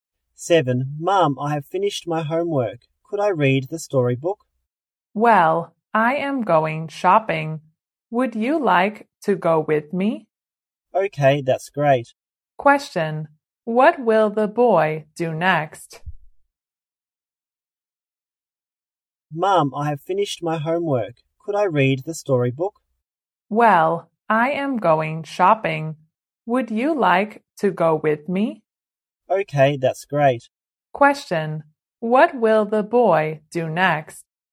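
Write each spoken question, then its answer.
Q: What will the boy do next?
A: Go shopping with his mum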